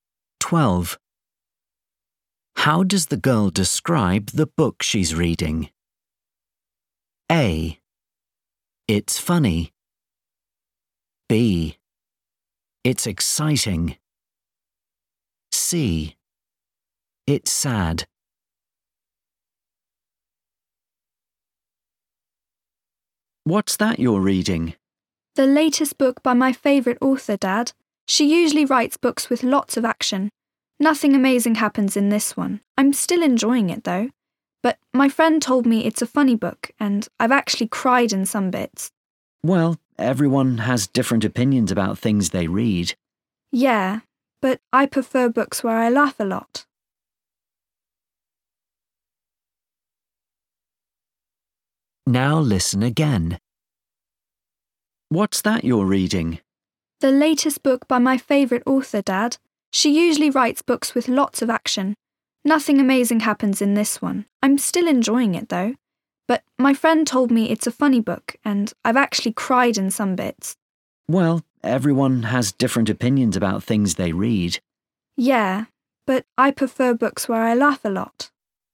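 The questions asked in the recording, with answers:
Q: How does the girl describe the book she's reading?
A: C: It's sad.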